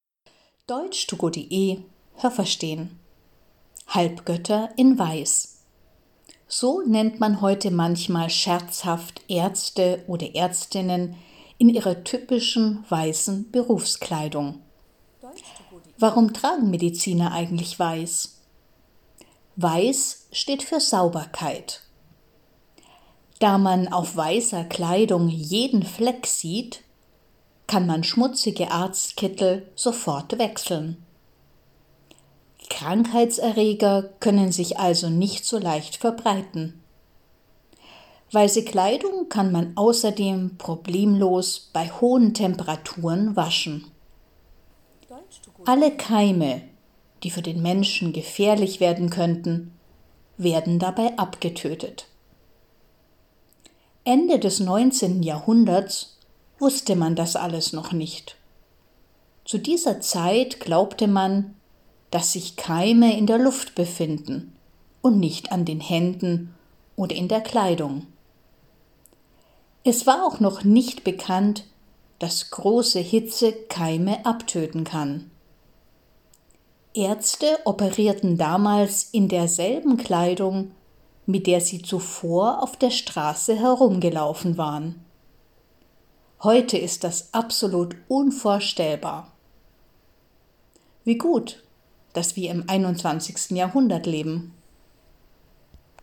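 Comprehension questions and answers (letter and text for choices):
Was haben Sie gehört? Es gibt nur eine korrekte Antwort.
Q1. „Halbgötter in Weiß" – das ist eine _____ für Ärzte und Ärztinnen.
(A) negative Bezeichnung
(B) ironische Bezeichnung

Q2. Auf weißer Kleidung sieht man ...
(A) alle Flecken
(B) alle Ecken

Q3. Wenn man einen schmutzigen Arztkittel schnell wechselt, ...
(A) haben Krankheitserreger keine Chance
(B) können Krankheitserreger Probleme machen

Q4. Man kann weiße Kleidung _____ waschen.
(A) nur kalt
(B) auch heiß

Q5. Wenn man weiße Kleidung heiß wäscht, ...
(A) können Keime für den Menschen gefährlich werden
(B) werden Keime abgetötet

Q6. Ende des 19. Jahrhunderts glaubte man, ...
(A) dass Keime nur in der Luft sind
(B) dass Keime auch in der Kleidung sind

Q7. Wenn Ärzte Ende des 19. Jahrhunderts operierten, trugen sie ...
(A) besondere Berufskleidung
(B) ihre alltägliche Kleidung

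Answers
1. (B) ironische Bezeichnung
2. (A) alle Flecken
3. (A) haben Krankheitserreger keine Chance
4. (B) auch heiß
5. (B) werden Keime abgetötet
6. (A) dass Keime nur in der Luft sind
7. (B) ihre alltägliche Kleidung

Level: A2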